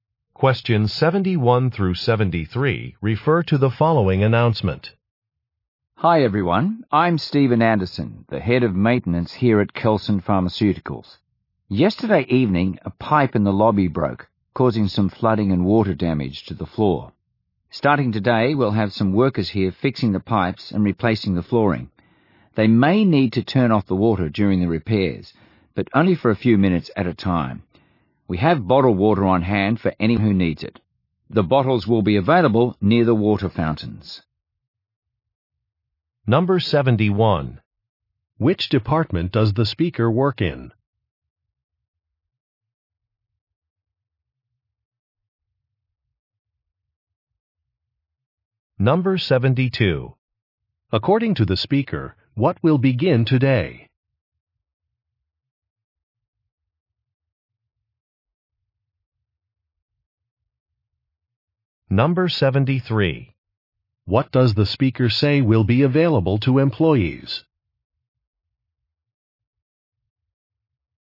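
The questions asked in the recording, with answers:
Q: Which department does the speaker work in?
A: Maintenance

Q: According to the speaker, what will begin today?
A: Repairs to the pipes and flooring

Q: What does the speaker say will be available to employees?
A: Bottled water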